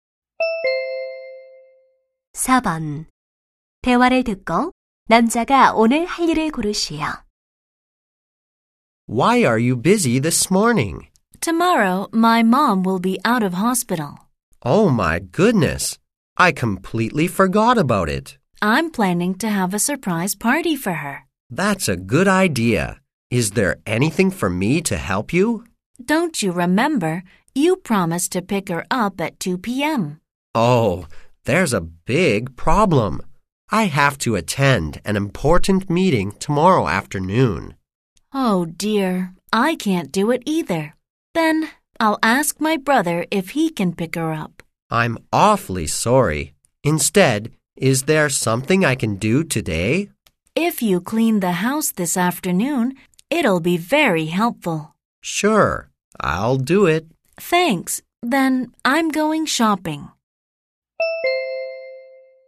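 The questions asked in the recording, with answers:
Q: 대화를 듣고 남자가 오늘 할 일을 고르시오.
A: 집 청소하기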